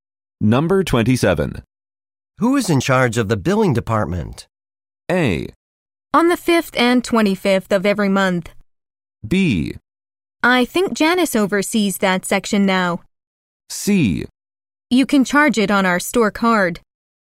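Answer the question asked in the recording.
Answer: B: I think Janice oversees that section now.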